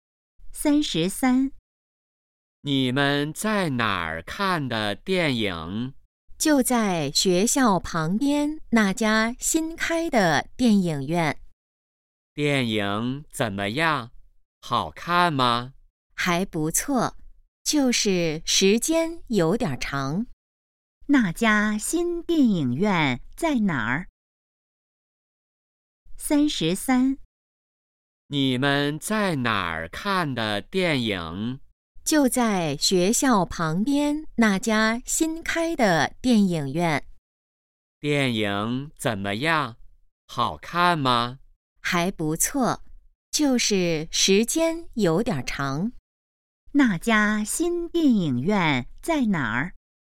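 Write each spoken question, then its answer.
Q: 那家新电影院在哪儿?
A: 学校旁边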